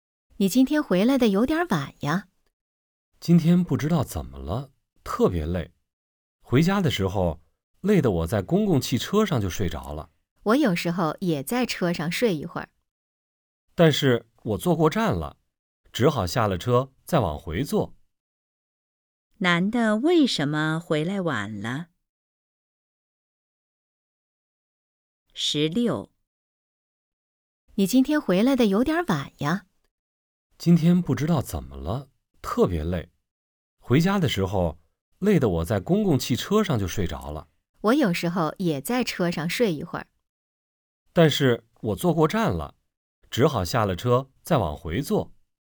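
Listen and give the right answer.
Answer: 在公共汽车上睡着了,坐过站了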